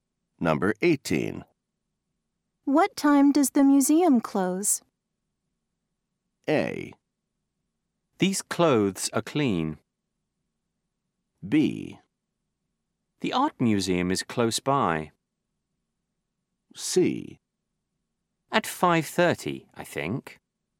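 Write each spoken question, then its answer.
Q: What time does the museum close?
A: C: At 5:30, I think.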